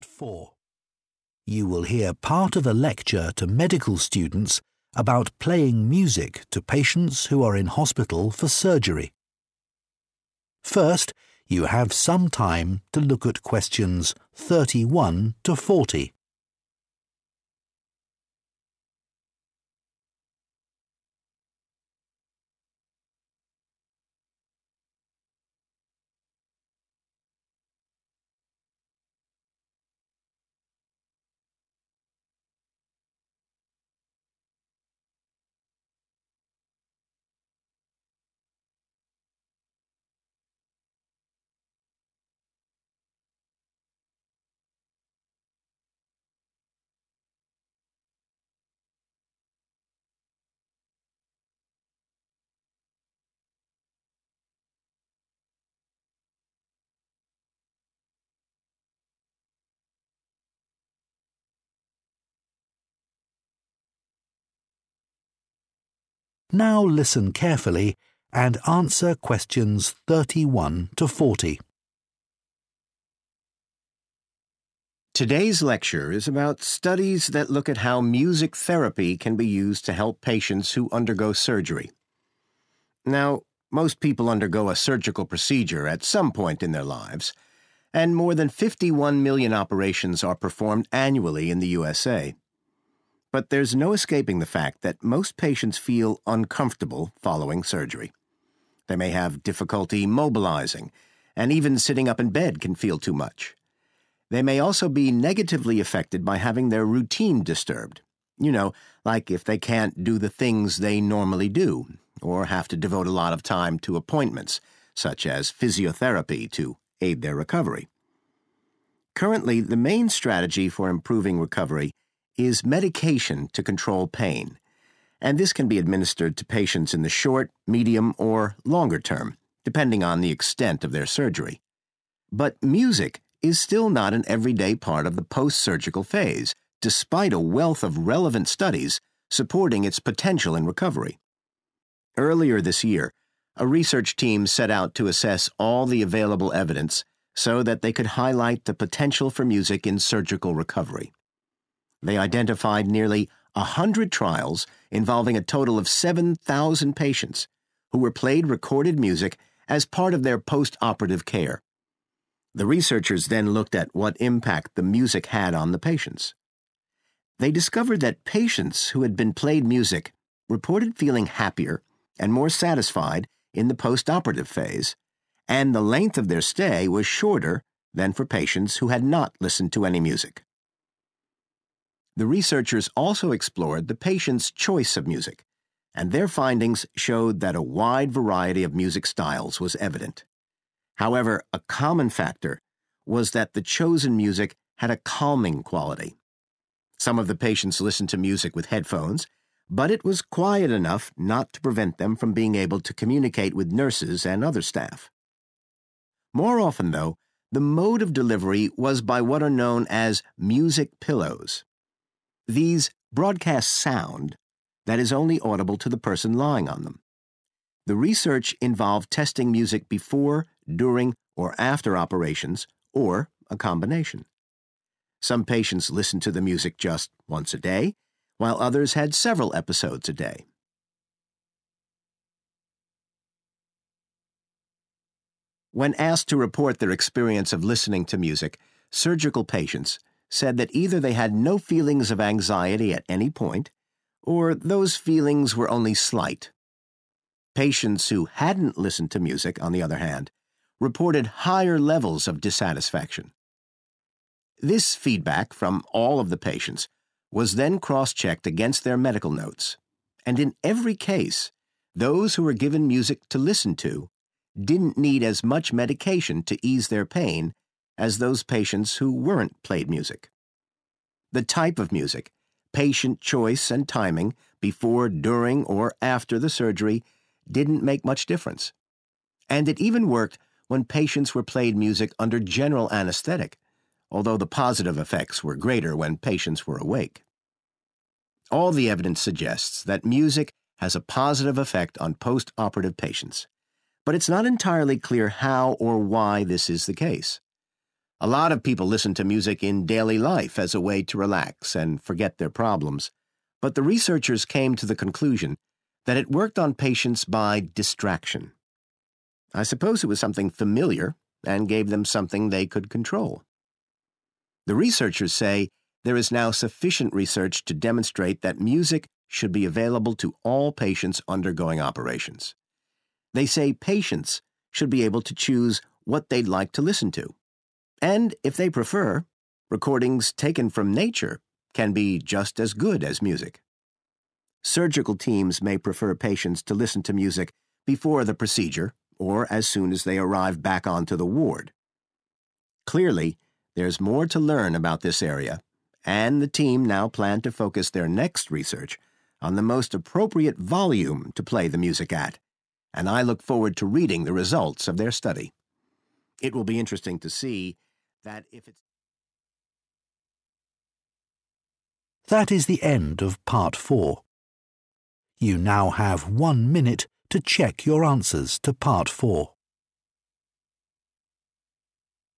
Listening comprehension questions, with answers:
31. Surgery impacts patients because they may experience discomfort or unwelcome changes to their 31 ................................ .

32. A study reviewed data from about 100 32 ................................ and found that listening to music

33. The patients in the study all listened to music with a 33 ................................ effect.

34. The music was mostly played through music 34 ................................ .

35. Patients reported an absence or low levels of 35 ................................ .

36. Medical records confirmed that patients who were played music in hospital needed less 36 ................................ than those who weren't played music.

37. The best results were achieved when patients were played music while they were 37 ................................ .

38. The study concluded that playing music was effective because it served as a 38 ................................ .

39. The researchers recommended playing either music or sounds from 39 ................................ to all surgical patients.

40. A future study will investigate the best 40 ................................ for the music.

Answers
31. routine
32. trials
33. calming
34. pillows
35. anxiety
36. medication
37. awake
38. distraction
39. nature
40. volume

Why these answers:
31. Từ cần điền là danh từ vì đứng sau tính từ sở hữu their. Nội dung bài: Đề cập đến việc phẫu thuật ảnh hưởng đến bệnh nhân vì họ cũng có thể bị ảnh hưởng tiêu cực khi thói quen sinh hoạt hằng ngày của họ bị xáo trộn, chẳng hạn như khi họ không thể làm những việc mà họ vẫn thường làm.
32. Từ cần điền là danh từ số nhiều vì đứng sau about 100.
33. Từ cần điền là tính từ vì bổ nghĩa cho danh từ effect. Nội dung bài: Điểm chung là loại nhạc được lựa chọn đều có đặc tính giúp tạo cảm giác thư giãn và bình tĩnh.
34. Từ cần điền là danh từ số nhiều. Nội dung bài: Tuy nhiên, phổ biến hơn cả, âm nhạc được truyền tải thông qua một thiết bị gọi là "gối âm nhạc" (music pillows).
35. Từ cần điền là danh từ vì đứng sau cụm low levels of. Nội dung bài: Khi được yêu cầu chia sẻ trải nghiệm nghe nhạc của mình, các bệnh nhân phẫu thuật cho biết rằng hoặc là họ hoàn toàn không cảm thấy lo âu vào bất kỳ thời điểm nào, hoặc nếu có thì cảm giác lo âu chỉ ở mức rất nhẹ.
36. Từ cần điền là danh từ vì đi sau động từ 'needed' và lượng từ 'less'. Nội dung bài: Những bệnh nhân được nghe nhạc không cần dùng nhiều thuốc giảm đau như những bệnh nhân không được nghe nhạc.
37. Từ cần điền là tính từ vì đứng sau động từ were. Nội dung bài: Phương pháp này thậm chí vẫn có hiệu quả ngay cả khi bệnh nhân được nghe nhạc trong lúc đang được gây mê toàn thân, mặc dù hiệu quả tích cực rõ rệt hơn khi bệnh nhân còn tỉnh.
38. Từ cần điền là danh từ vì đi sau mạo từ a. Nội dung bài: Các nhà nghiên cứu đi đến kết luận rằng phương pháp này có tác dụng đối với bệnh nhân nhờ cơ chế đánh lạc hướng sự chú ý.
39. Từ cần điền là danh từ vì đi sau giới từ from. Nội dung bài: Các nhà nghiên cứu cho rằng bệnh nhân nên được tự lựa chọn những gì họ muốn nghe; và nếu họ thích, các bản ghi âm âm thanh từ thiên nhiên cũng có thể mang lại hiệu quả tốt như âm nhạc.
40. Từ cần điền là danh từ vì đi sau 'the best'. Nội dung bài: Nhóm nghiên cứu hiện dự định tập trung nghiên cứu tiếp theo vào việc xác định mức âm lượng phù hợp nhất để phát nhạc.

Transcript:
You will hear part of a lecture to medical students about playing music to patients who are in hospital for surgery. First, you have some time to look at questions 31 to 40.
Now listen carefully and answer questions 31 to 40.
Today's lecture is about studies that look at how music therapy can be used to help patients who undergo surgery.
Now, most people undergo a surgical procedure at some point in their lives, and more than 51 million operations are performed annually in the USA. But there's no escaping the fact that most patients feel uncomfortable following surgery. They may have difficulty mobilizing, and even sitting up in bed can feel too much. They may also be negatively affected by having their routine disrupted, you know, like if they can't do the things they normally do, or have to devote a lot of time to appointments, such as physiotherapy to aid their recovery.
Currently, the main strategy for improving recovery is medication to control pain, and this can be administered to patients in the short, medium, or longer term, depending on the extent of their surgery. But music is still not an everyday part of the post-surgical phase, despite a wealth of relevant studies supporting its potential in recovery.
Earlier this year, a research team set out to assess all the available evidence so that they could highlight the potential for music in surgical recovery. They identified nearly a hundred trials involving a total of 7,000 patients who were played recorded music as part of their post-operative care. The researchers then looked at what impact the music had on the patients.
They discovered that patients who had been played music reported feeling happier and more satisfied in the post-operative phase, and the length of their stay was shorter than for patients who had not listened to any music.
The researchers also explored the patients' choice of music, and their findings showed that a wide variety of music styles was evident. However, a common factor was that the chosen music had a calming quality. Some of the patients listened to music with headphones, but it was quiet enough not to prevent them from being able to communicate with nurses and other staff.
More often though, the mode of delivery was by what are known as music pillows. These broadcast sound that is only audible to the person lying on them. The research involved testing music before, during, or after operations, or a combination. Some patients listened to the music just once a day, while others had several episodes a day.
When asked to report their experience of listening to music, surgical patients said that either they had no feelings of anxiety at any point, or those feelings were only slight. Patients who hadn't listened to music, on the other hand, reported higher levels of dissatisfaction.
This feedback from all of the patients was then cross-checked against their medical notes. And in every case, those who were given music to listen to didn't need as much medication to ease their pain as those patients who weren't played music.
The type of music, patient choice, and timing—before, during, or after the surgery—didn't make much difference. And it even worked when patients were played music under general anesthetic, although the positive effects were greater when patients were awake.
All the evidence suggests that music has a positive effect on post-operative patients, but it's not entirely clear how or why this is the case. A lot of people listen to music in daily life as a way to relax and forget their problems, but the researchers came to the conclusion that it worked on patients by distraction. I suppose it was something familiar and gave them something they could control.
The researchers say there is now sufficient research to demonstrate that music should be available to all patients undergoing operations. They say patients should be able to choose what they'd like to listen to. And if they prefer, recordings taken from nature can be just as good as music.
Surgical teams may prefer patients to listen to music before the procedure, or as soon as they arrive back onto the ward. Clearly, there's more to learn about this area, and the team now plan to focus their next research on the most appropriate volume to play the music at, and I look forward to reading the results of their study. It will be interesting to see that if it's...
That is the end of part 4. You now have one minute to check your answers to part 4.